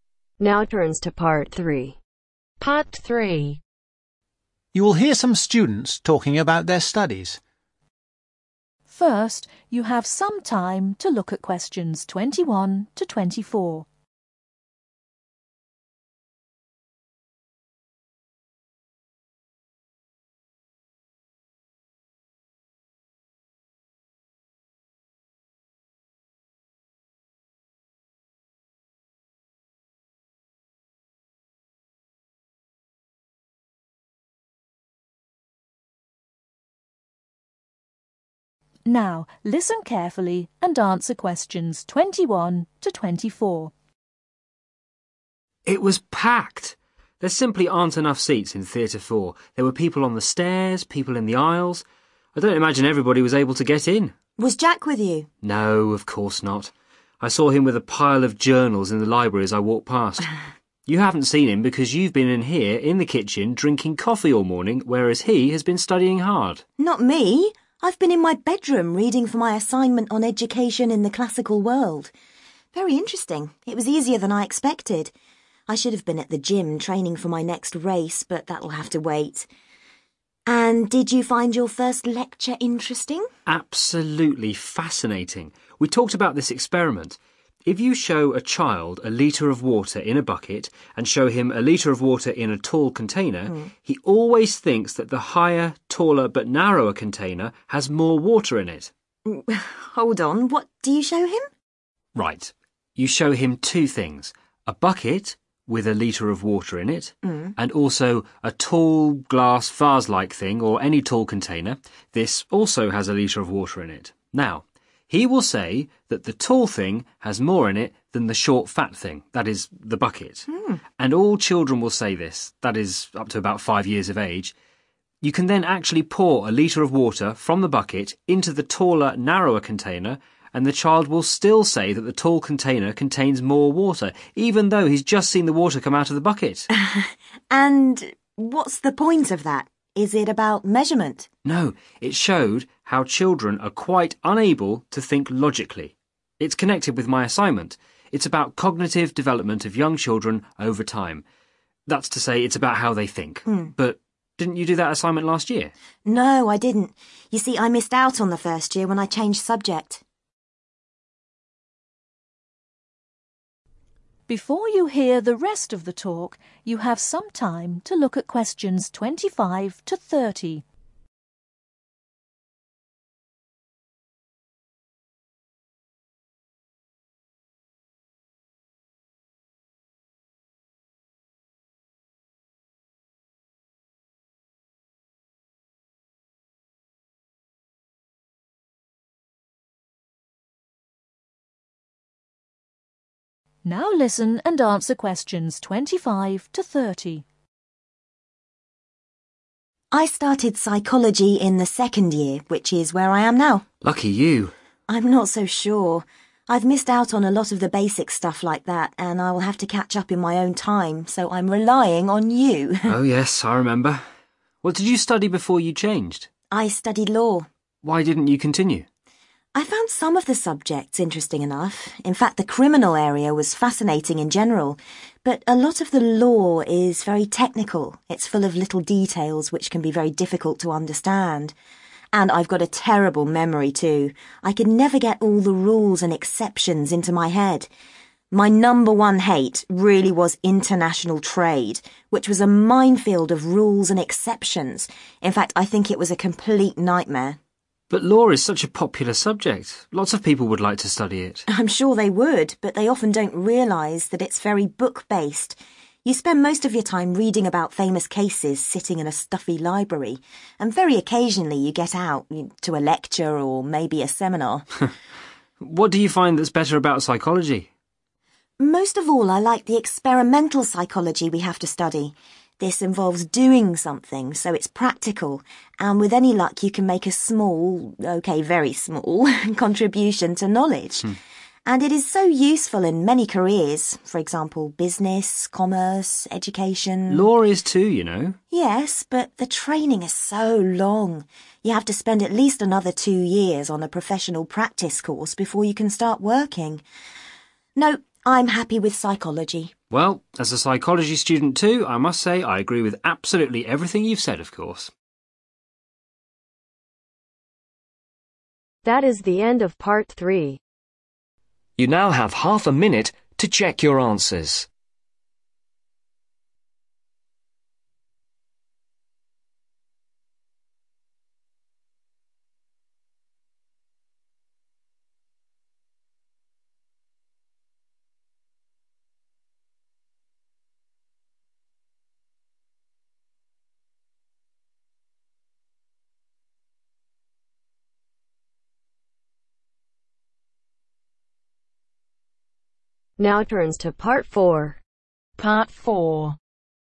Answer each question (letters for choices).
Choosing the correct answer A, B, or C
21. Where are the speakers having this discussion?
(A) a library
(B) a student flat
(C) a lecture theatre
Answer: B

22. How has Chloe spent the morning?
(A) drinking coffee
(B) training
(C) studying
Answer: C

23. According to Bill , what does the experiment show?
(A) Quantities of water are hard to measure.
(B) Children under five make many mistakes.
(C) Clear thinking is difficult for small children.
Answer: C

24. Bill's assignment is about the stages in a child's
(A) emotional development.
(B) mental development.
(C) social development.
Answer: B

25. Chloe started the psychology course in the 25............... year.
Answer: second

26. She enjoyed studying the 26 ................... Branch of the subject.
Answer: criminal

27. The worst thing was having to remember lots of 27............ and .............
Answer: rules exceptions

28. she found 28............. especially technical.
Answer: international trade

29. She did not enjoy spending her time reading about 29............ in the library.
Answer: famous cases

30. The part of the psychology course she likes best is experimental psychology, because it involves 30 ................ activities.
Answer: practical